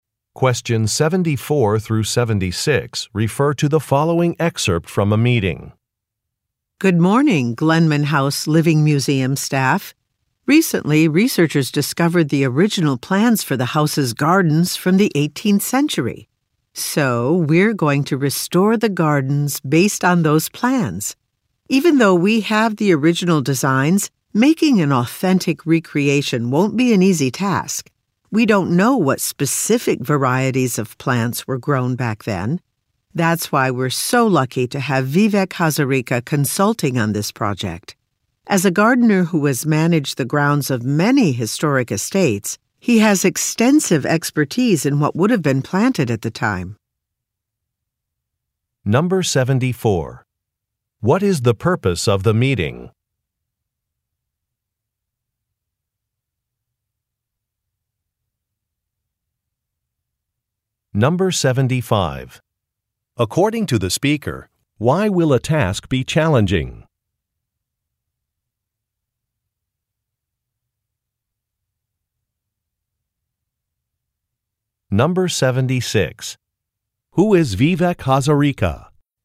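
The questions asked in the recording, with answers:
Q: What is the purpose of the meeting?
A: To discuss restoring the house's gardens based on the original plans

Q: According to the speaker, why will a task be challenging?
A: They don't know what specific plant varieties were grown then

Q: Who is Vivek Hazarika?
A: A gardener who is an expert on historic estates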